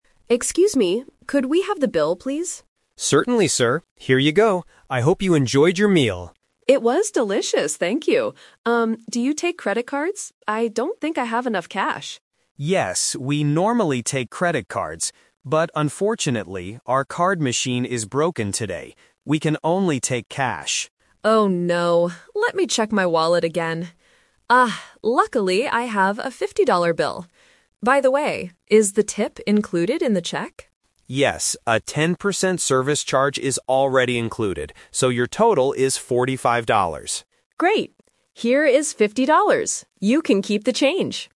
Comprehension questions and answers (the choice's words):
Listen to the conversation between a customer and a waiter, and choose the correct answer (A, B, or C) for each question.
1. How does the customer pay for the meal?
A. With a credit card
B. With cash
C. With a mobile app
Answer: With cash

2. What is the problem at the restaurant today?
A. They do not accept credit cards at all.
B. The credit card machine is not working.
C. They gave the customer the wrong bill.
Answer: The credit card machine is not working.

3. What is already included in the final bill?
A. A 10% service charge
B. A free dessert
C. A credit card fee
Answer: A 10% service charge

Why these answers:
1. The customer pays with a "fifty-dollar bill" (cash) at the end. Option (A) is the trap; the customer originally wanted to pay with a credit card, but he couldn't. Option (C) is a plausible modern way to pay, but it is never mentioned.
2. The waiter clearly states, "our card machine is broken today." Option (A) is a trap; the restaurant does normally take credit cards, but they can't today because of the machine. Option (C) is a common restaurant problem but is not mentioned here.
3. When the customer asks about the tip, the waiter says, "Yes, a 10% service charge is already included." Option (C) is a trap because they talk about credit cards earlier, but there is no fee for it. Option (B) is plausible but is not mentioned in the audio.

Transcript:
Customer: Excuse me, could we have the bill, please?
Waiter: Certainly, sir. Here you go. I hope you enjoyed your meal.
Customer: It was delicious, thank you. Um, do you take credit cards? I don't think I have enough cash.
Waiter: Yes, we normally take credit cards. But unfortunately, our card machine is broken today. We can only take cash.
Customer: Oh no! Let me check my wallet again. Ah, luckily, I have a fifty-dollar bill. By the way, is the tip included in the check?
Waiter: Yes, a 10% service charge is already included.